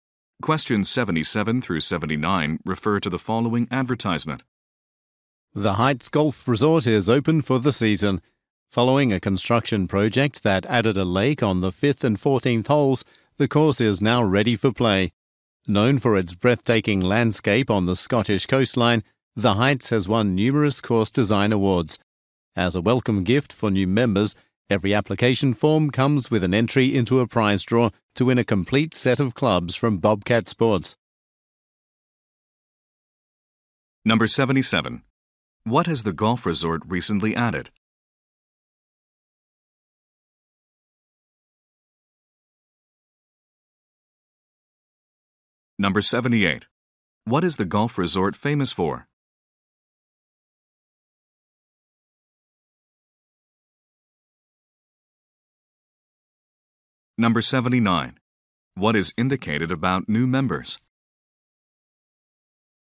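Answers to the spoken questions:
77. A lake
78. Its breathtaking landscape on the Scottish coast
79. They are entered into a prize draw for a set of golf clubs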